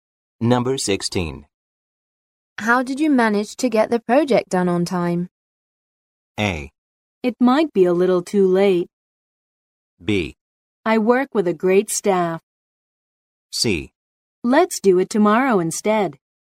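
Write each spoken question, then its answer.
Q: How did you manage to get the project done on time?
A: B: I work with a great staff.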